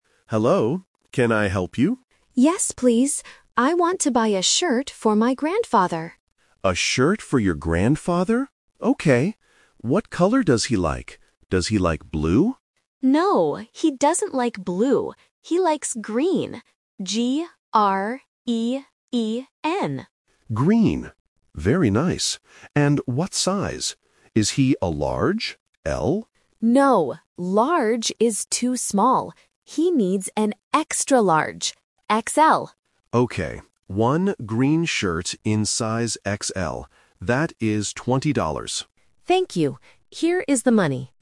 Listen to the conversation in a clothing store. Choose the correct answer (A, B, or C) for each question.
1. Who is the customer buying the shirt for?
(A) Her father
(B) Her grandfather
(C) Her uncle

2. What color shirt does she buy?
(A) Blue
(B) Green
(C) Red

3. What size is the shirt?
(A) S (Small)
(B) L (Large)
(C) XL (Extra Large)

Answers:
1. Her grandfather
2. Green
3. XL (Extra Large)

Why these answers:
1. The customer explicitly says, "I want to buy a shirt for my grandfather," and the assistant repeats it. Option A (father) and Option C (uncle) are other male family members, acting as distractors.
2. The assistant asks, "Does he like blue?" (Option A is the trap). The customer answers, "No, he doesn't like blue. He likes green," and spells the word G-R-E-E-N. Option C (Red) is a plausible color but is never mentioned.
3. The assistant asks if the size is "Large" or "L" (Option B is the trap). The customer says, "No, Large is too small. He needs an Extra Large. X-L." Option A (Small) is a trap because the customer uses the word "small" to describe the Large size.

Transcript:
Assistant: Hello. Can I help you?
Customer: Yes, please. I want to buy a shirt for my grandfather.
Assistant: A shirt for your grandfather. Okay. What color does he like? Does he like blue?
Customer: No, he doesn't like blue. He likes green. G-R-E-E-N.
Assistant: Green. Very nice. And what size? Is he a Large? L?
Customer: No, Large is too small. He needs an Extra Large. X-L.
Assistant: Okay, one green shirt in size XL. That is 20 dollars.

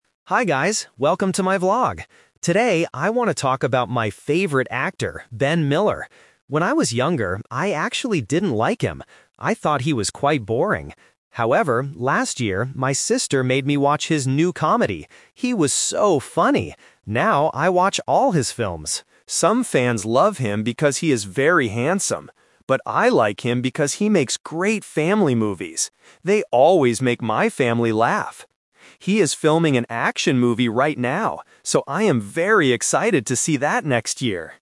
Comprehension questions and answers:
Listen to the vlog and choose the correct answer (A, B, or C) for each question.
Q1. What did the vlogger think about Ben Miller in the past?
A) He was funny.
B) He was boring.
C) He was handsome.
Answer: He was boring.

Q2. Why does the vlogger like Ben Miller now?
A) Because he is very handsome.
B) Because he makes great family movies.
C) Because his sister likes him.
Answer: Because he makes great family movies.

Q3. What kind of movie is Ben Miller making right now?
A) A comedy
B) A family movie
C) An action movie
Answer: An action movie

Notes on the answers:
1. The vlogger says, "When I was younger, I actually didn't like him. I thought he was quite boring." Option A is the trap because that is her current opinion of him. Option C is the trap because that is what other fans think.
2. The vlogger explicitly states, "Some fans love him because he is very handsome (Option A is the trap), but I like him because he makes great family movies." Option C is not the reason she likes him; her sister only introduced her to his movie.
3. At the end of the vlog, she says, "He is filming an action movie right now." Option A is the trap because a comedy was the movie she watched last year. Option B is the trap because family movies are what he usually makes.

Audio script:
Vlogger: Hi guys, welcome to my vlog! Today, I want to talk about my favorite actor, Ben Miller. When I was younger, I actually didn't like him. I thought he was quite boring. However, last year, my sister made me watch his new comedy. He was so funny! Now, I watch all his films. Some fans love him because he is very handsome, but I like him because he makes great family movies. They always make my family laugh. He is filming an action movie right now. So, I am very excited to see that next year!

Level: A2

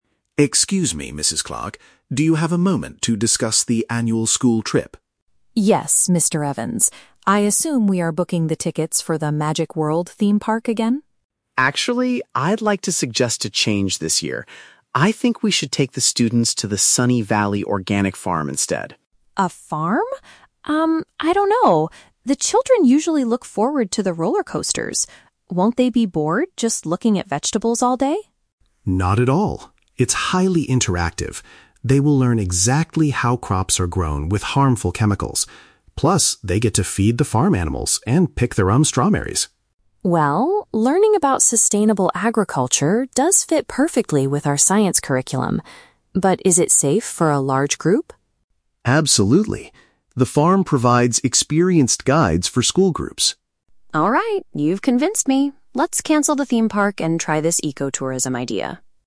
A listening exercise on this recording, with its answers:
Listen to a conversation between a teacher and a school principal. Choose the correct answer (A, B, or C) for each question.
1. What was the school's original plan for the student trip?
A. To visit an amusement park.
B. To plant vegetables in a garden.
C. To pick strawberries at a farm.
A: To visit an amusement park.

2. Why does the principal initially hesitate about the new proposal?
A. Because the farm tickets are too expensive for the school.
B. Because she thinks the students will not find it exciting.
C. Because the farmers use dangerous chemicals on the crops.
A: Because she thinks the students will not find it exciting.

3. How does the farm trip connect to the students' current studies?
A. It teaches them how to cook healthy meals.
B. It helps them prepare for their physical education class.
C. It matches the topics they are learning in science.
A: It matches the topics they are learning in science.

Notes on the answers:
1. Mrs. Clark initially assumes they are booking tickets for the "Magic World Theme Park" (paraphrased as "amusement park") and mentions the "roller coasters."
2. The principal is worried the children will be "bored just looking at vegetables all day" (paraphrased as "will not find it exciting").
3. Mrs. Clark agrees that learning about sustainable agriculture "fits perfectly with our science curriculum" (paraphrased as "matches the topics they are learning in science").

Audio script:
Mr. Evans: Excuse me, Mrs. Clark. Do you have a moment to discuss the annual school trip?
Mrs. Clark: Yes, Mr. Evans. I assume we are booking the tickets for the Magic World Theme Park again?
Mr. Evans: Actually, I'd like to suggest a change this year. I think we should take the students to the Sunny Valley Organic Farm instead.
Mrs. Clark: A farm? Um, I don't know. The children usually look forward to the roller coasters. Won't they be bored just looking at vegetables all day?
Mr. Evans: Not at all! It's highly interactive. They will learn exactly how crops are grown without harmful chemicals. Plus, they get to feed the farm animals and pick their own strawberries.
Mrs. Clark: Well, learning about sustainable agriculture does fit perfectly with our science curriculum. But is it safe for a large group?
Mr. Evans: Absolutely. The farm provides experienced guides for school groups.
Mrs. You've convinced me. Let's cancel the theme park and try this ecotourism idea.

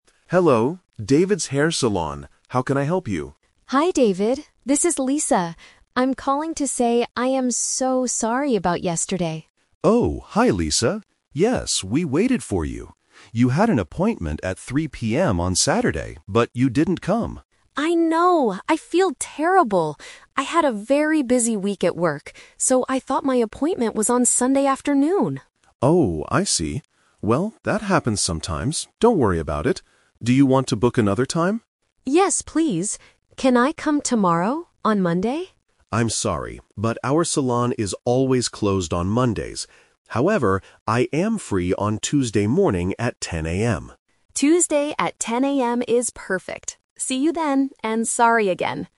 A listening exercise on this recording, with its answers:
Listen to the phone conversation between a customer and a hairdresser. Then, circle the correct answer for each question.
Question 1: When was Lisa's original appointment?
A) On Saturday afternoon.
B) On Sunday afternoon.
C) On Tuesday morning.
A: On Saturday afternoon.

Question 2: Why didn't Lisa go to the hair salon?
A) Because she had to work late.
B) Because she forgot the correct day.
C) Because she went to a different salon.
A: Because she forgot the correct day.

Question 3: When will Lisa get her haircut?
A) On Sunday.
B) On Monday.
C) On Tuesday.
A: On Tuesday.

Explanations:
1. David says, "You had an appointment at 3:00 PM on Saturday..." Option (B) is the trap (The Twist); Sunday afternoon is when Lisa thought she had the appointment. Option (C) is the new appointment time.
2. Lisa explains her mistake: "...so I thought my appointment was on Sunday afternoon." This means she remembered the wrong day. Option (A) is a trap; she had a "busy week at work," but she didn't work late on the weekend. Option (C) is never mentioned.
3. David offers, "I am free on Tuesday morning at 10:00 AM," and Lisa agrees, "Tuesday at 10:00 AM is perfect." Option (A) is the day of the phone call. Option (B) is a trap; Lisa wanted to come on Monday, but the salon is closed.

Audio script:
David: Hello, David's Hair Salon. How can I help you?
Lisa: Hi, David. This is Lisa. I'm calling to say I am so sorry about yesterday.
David: Oh, hi Lisa. Yes, we waited for you. You had an appointment at 3:00 PM on Saturday, but you didn't come.
Lisa: I know, I feel terrible! I had a very busy week at work, so I thought my appointment was on Sunday afternoon.
David: Oh, I see. Well, that happens sometimes. Don't worry about it. Do you want to book another time?
Lisa: Yes, please. Can I come tomorrow, on Monday?
David: I'm sorry, but our salon is always closed on Mondays. However, I am free on Tuesday morning at 10:00 AM.
Lisa: Tuesday at 10:00 AM is perfect. See you then, and sorry again!

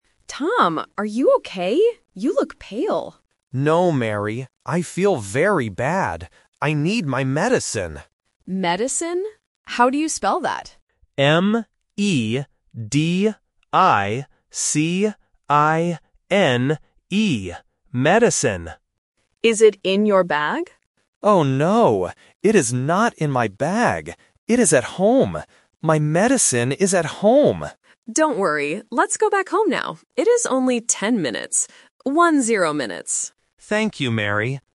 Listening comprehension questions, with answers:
Listen to the conversation. Circle the correct answer (A, B, or C).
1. What does Tom need?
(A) His money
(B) His medicine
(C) His mobile phone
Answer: His medicine

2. Where is Tom's medicine?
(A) In his bag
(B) At the doctor's office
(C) At home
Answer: At home

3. How long does it take to go home?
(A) 10 minutes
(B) 20 minutes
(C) 50 minutes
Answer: 10 minutes

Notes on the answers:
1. Tom says clearly, "I need my medicine," and spells it out "M-E-D-I-C-I-N-E". Option A (money) and C (mobile phone) are traps because they start with the same letter 'M', which often confuses A1 learners.
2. Tom says "My medicine is at home" and repeats it twice (A1 repetition technique). Option A (In his bag) is the main trap because Mary asks "Is it in your bag?", but Tom says "No". Option B is a plausible place but not mentioned.
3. Mary says "It is only 10 minutes" and repeats it as "One-zero minutes" to be clear. Option B (20) and C (50) are common A1 phonetic traps using numbers that sound similar in fast speech.

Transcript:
Mary: Tom, are you okay? You look pale.
Tom: No, Mary. I feel very bad. I need my medicine.
Mary: Medicine? How do you spell that?
Tom: M-E-D-I-C-I-N-E. Medicine.
Mary: Is it in your bag?
Tom: Oh no! It is not in my bag. It is at home. My medicine is at home.
Mary: Don't worry. Let's go back home now. It is only 10 minutes.

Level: A1

